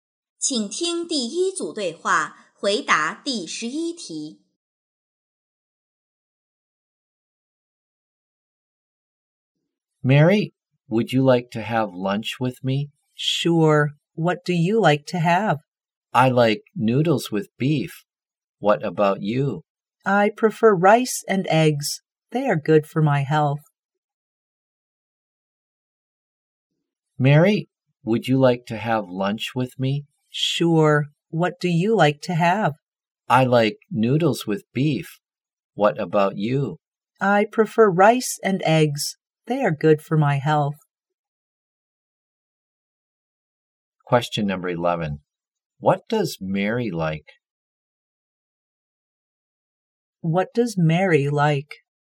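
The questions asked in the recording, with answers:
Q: What does Mary like?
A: Rice and eggs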